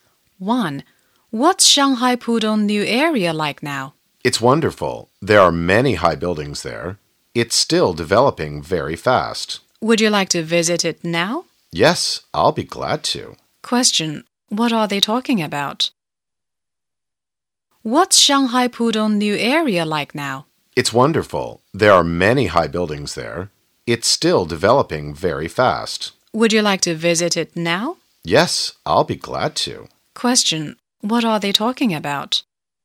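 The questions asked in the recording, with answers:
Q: What are they talking about?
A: Shanghai Pudong new area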